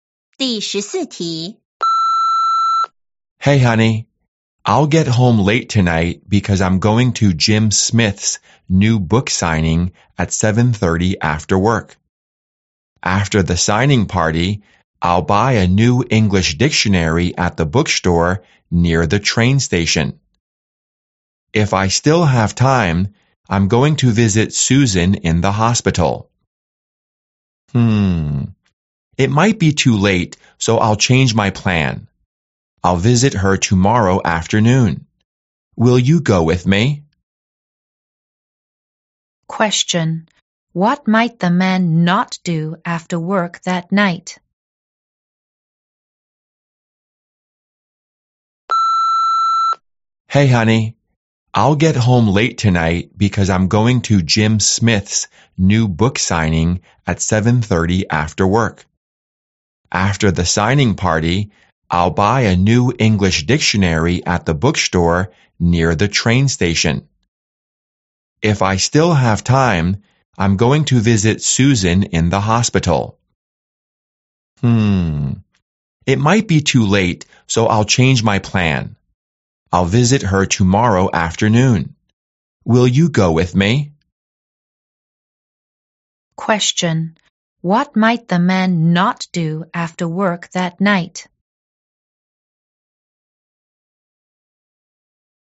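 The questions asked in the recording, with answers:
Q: Question. What might the man not do after work that night?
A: Visit Susan in the hospital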